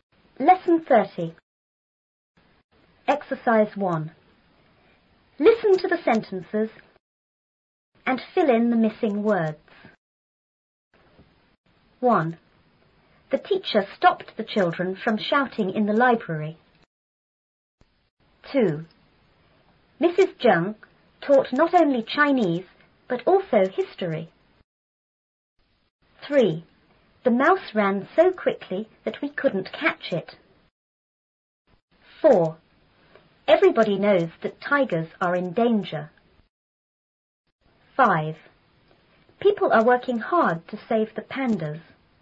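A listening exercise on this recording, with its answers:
and fill in the missing words.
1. The teacher___the children___shouting in the library.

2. Mrs Zheng taught___ ___Chinese___ ___history.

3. The mouse ran___quickly___we couldn't catch it.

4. Everybody knows that tigers are___ ___.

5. People are working___to___the pandas.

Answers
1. stopped / from
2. not only / but also
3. so / that
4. in danger
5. hard / save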